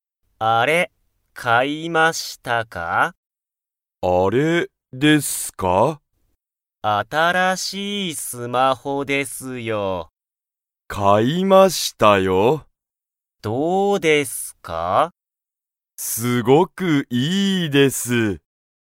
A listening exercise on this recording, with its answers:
田所(たどころ)さんは、新(あたら)しいスマホを____。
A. よかった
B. 教(おし)えた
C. わかった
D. 買(か)った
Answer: D. 買(か)った

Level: Level 1

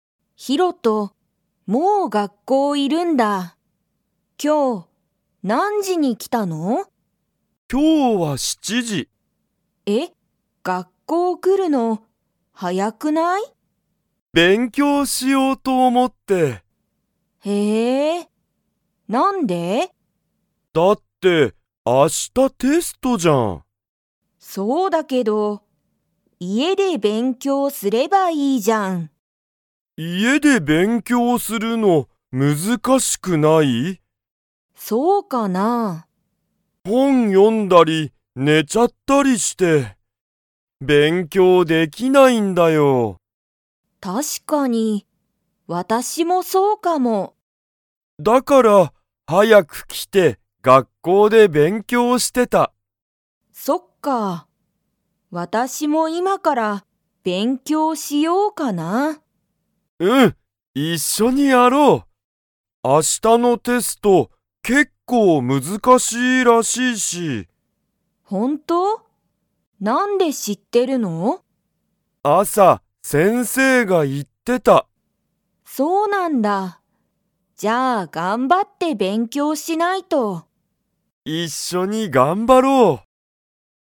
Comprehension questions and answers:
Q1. ヒロトは、____と思おもって学校がっこうに来きた。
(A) 本ほんを読よもう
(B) 寝ねよう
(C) 家いえに帰かえろう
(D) 勉強べんきょうしよう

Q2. ユウコとヒロトは、一緒いっしょに勉強べんきょうしますか?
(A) はい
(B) いいえ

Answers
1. (D) 勉強べんきょうしよう
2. (A) はい

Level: Level 2

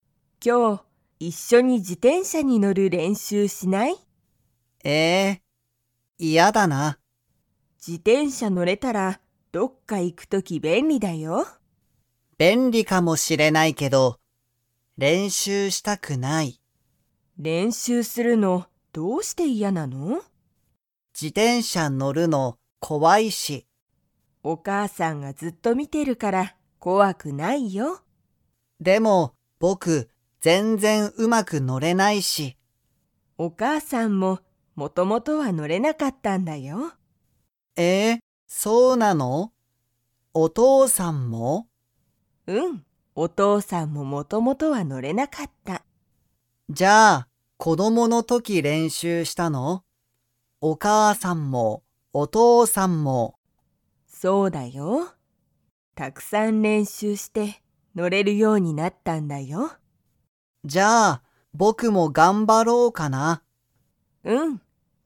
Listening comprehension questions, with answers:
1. ユウジは、自転車じてんしゃに乗のる をしたくない。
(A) 便利べんり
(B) お母かあさん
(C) 嫌いや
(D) 練習れんしゅう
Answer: (D) 練習れんしゅう

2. お父とうさんとお母かあさんは、元々もともと自転車じてんしゃに乗のれましたか?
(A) はい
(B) いいえ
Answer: (B) いいえ

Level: Level 3

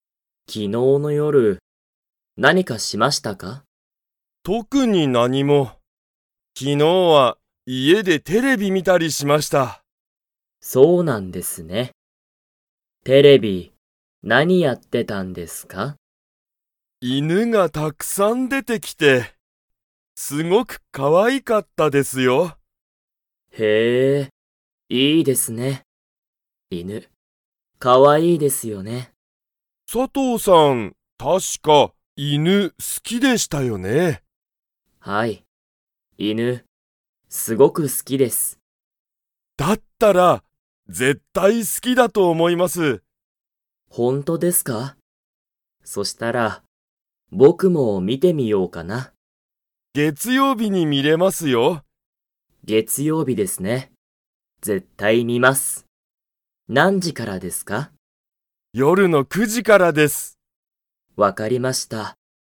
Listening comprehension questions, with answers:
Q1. テレビには、____がたくさん出(で)てきた。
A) 犬(いぬ)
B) 特(とく)に何なにも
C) 家(いえ)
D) 高橋たかはしさん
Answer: A) 犬(いぬ)

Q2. 佐藤(さとう)さんは、犬(いぬ)が好(す)きですか?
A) はい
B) いいえ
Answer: A) はい

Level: Level 2

